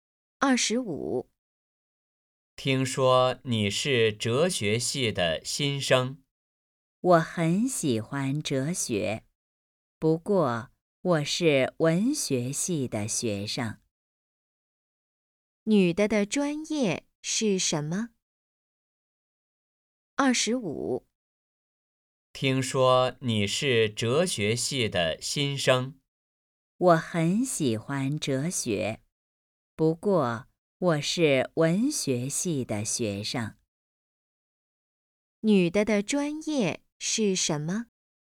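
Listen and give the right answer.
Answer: 文学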